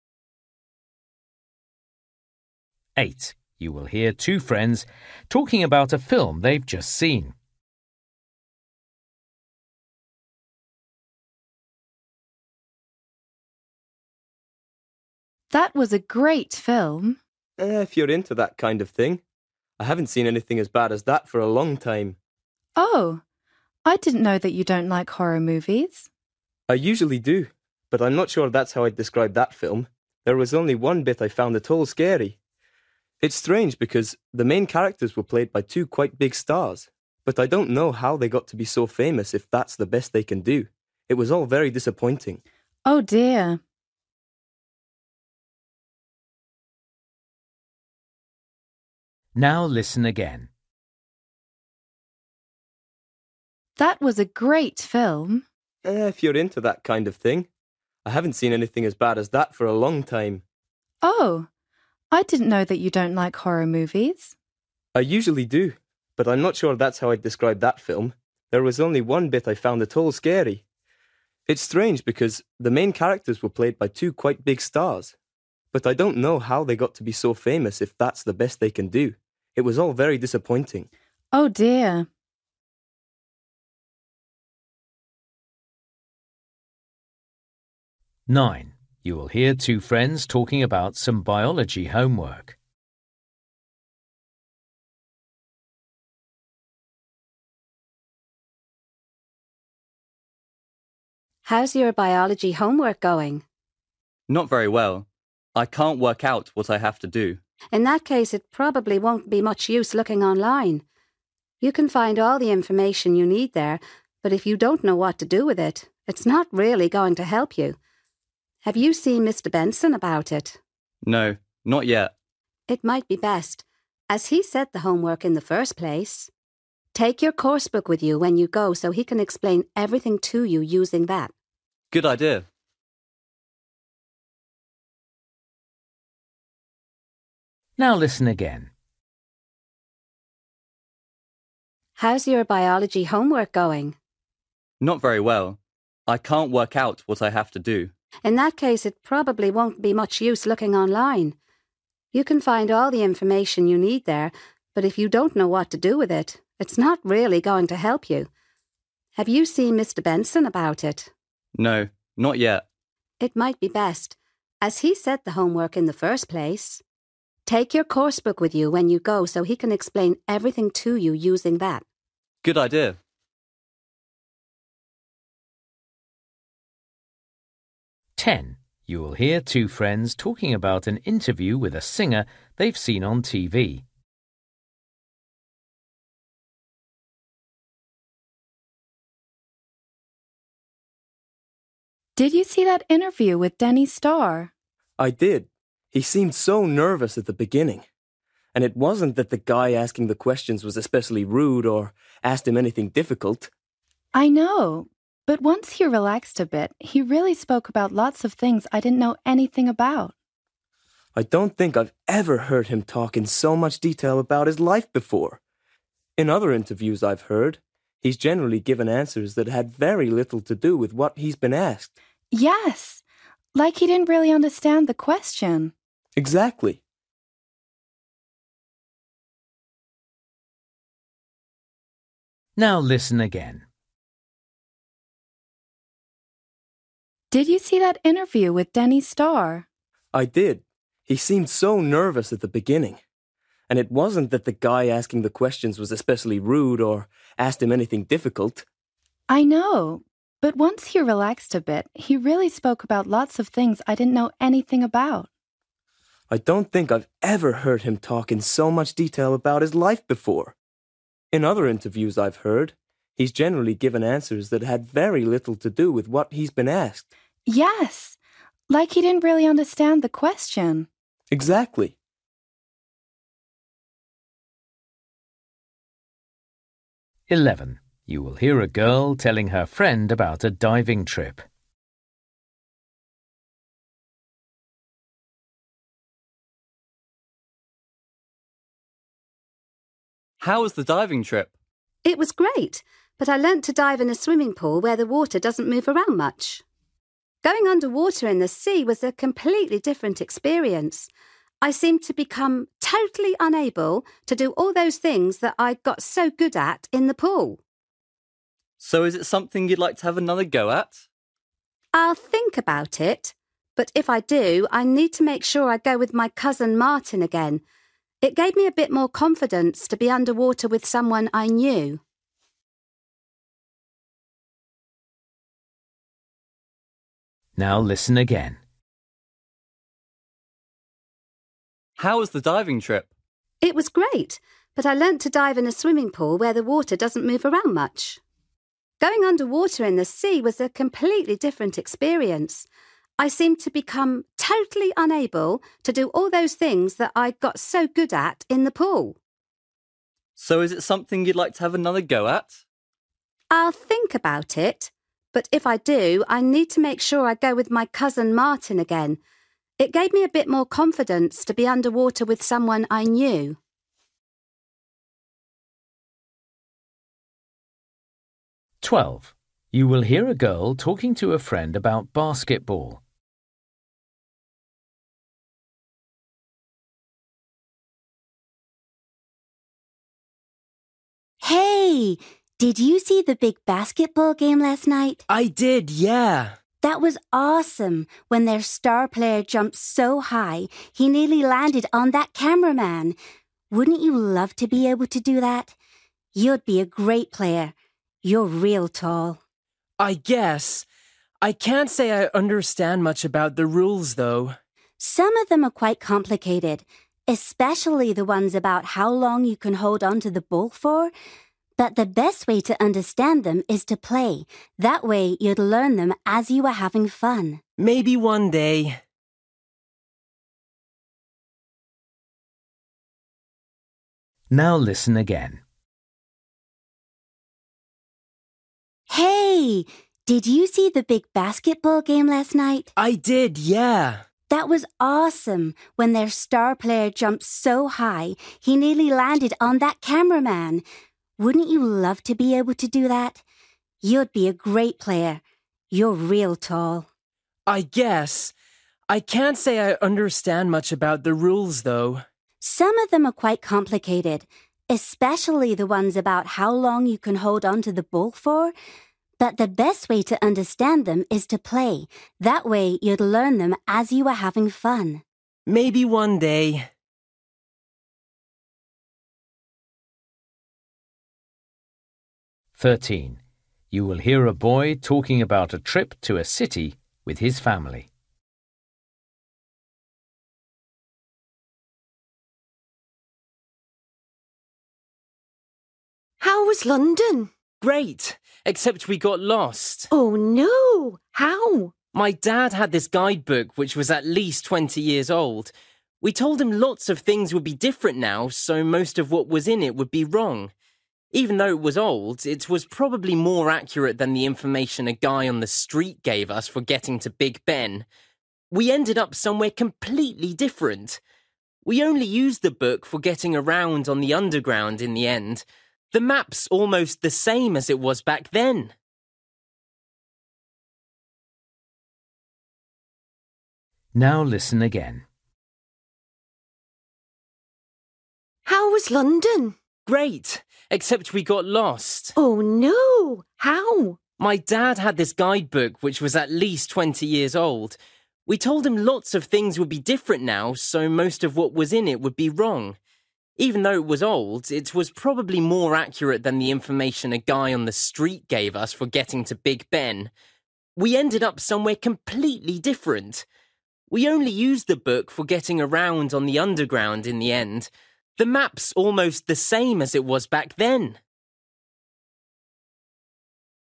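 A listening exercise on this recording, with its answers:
For each question, choose the correct answer.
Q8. You will hear two friends talking about a film they've just seen. Why didn't the boy enjoy the film?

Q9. You will hear two friends talking about some biology homework. The girl suggests that the boy should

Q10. You will hear two friends talking about an interview with a singer they've seen on TV. They agree that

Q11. You will hear a girl telling her friend about a diving trip. How did the girl feel about it?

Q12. You will hear a girl talking to a friend about basketball. The girl is trying to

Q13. You will hear a boy talking about a trip to a city with his family. Why did the boy's family get lost?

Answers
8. The acting by the main stars was poor.
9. ask his teacher, Mr Benson, to explain it using the coursebook
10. the singer talked about his life in more detail than before
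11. She found diving in the sea much harder than in the pool.
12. persuade her friend to start playing basketball
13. A man in the street gave them wrong directions.

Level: Luyện nghe trình độ B1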